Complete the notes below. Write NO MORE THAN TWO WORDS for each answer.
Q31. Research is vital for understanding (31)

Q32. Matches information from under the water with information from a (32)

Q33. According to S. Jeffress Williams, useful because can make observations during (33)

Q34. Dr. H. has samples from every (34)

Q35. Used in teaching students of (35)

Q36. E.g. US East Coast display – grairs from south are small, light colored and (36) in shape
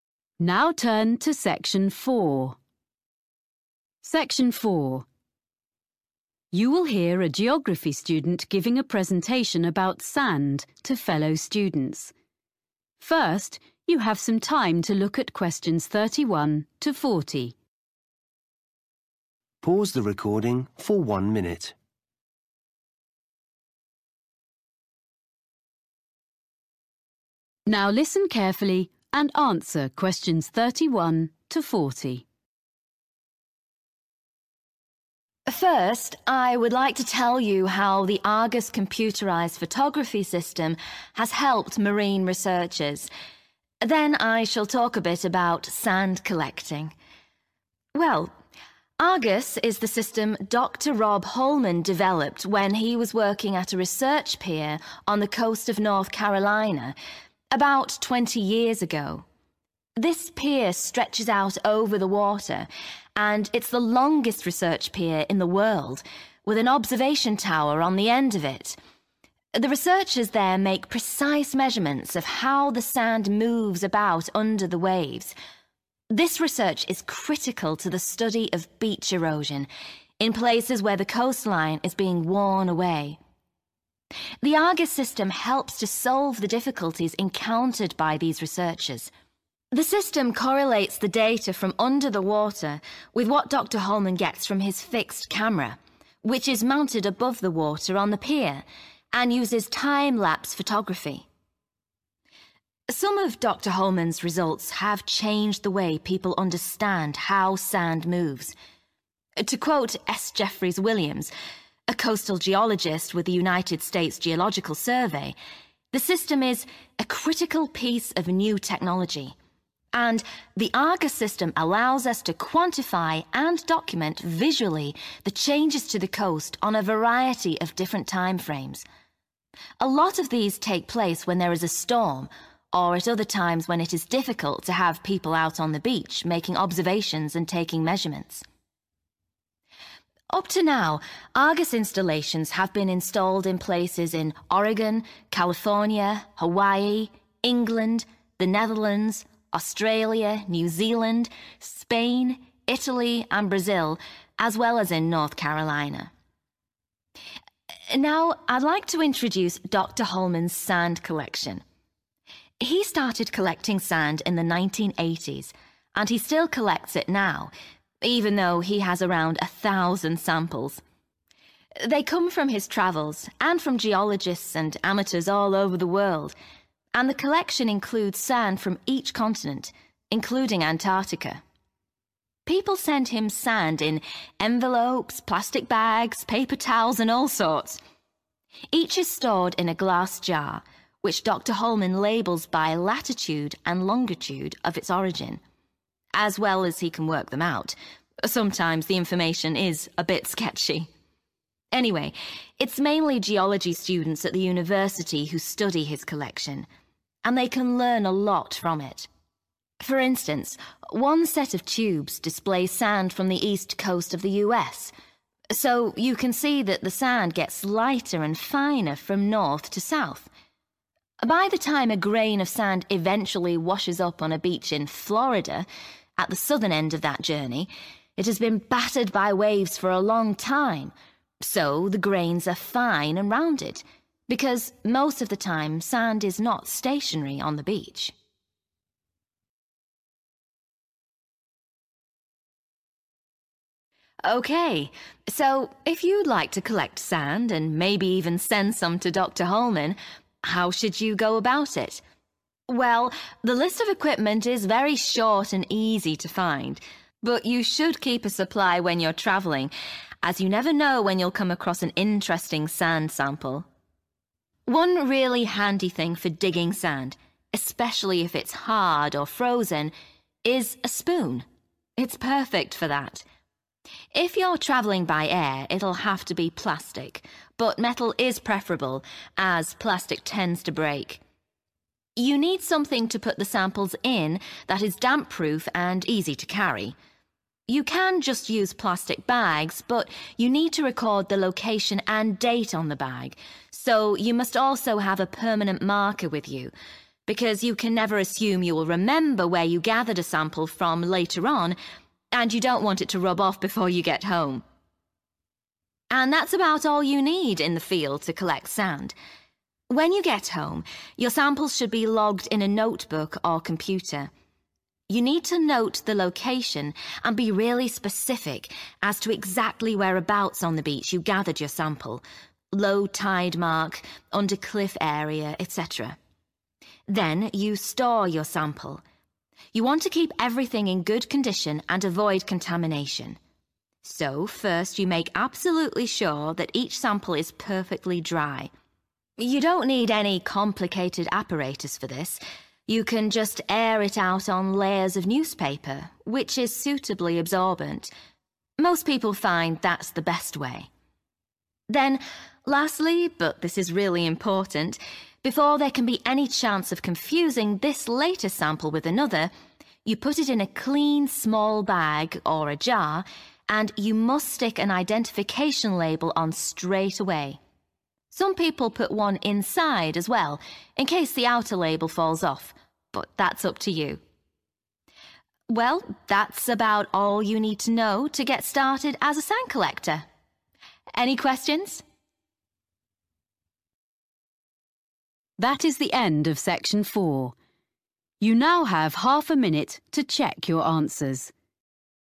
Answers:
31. beach erosion
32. (fixed) camera
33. storm
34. continent
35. geology
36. round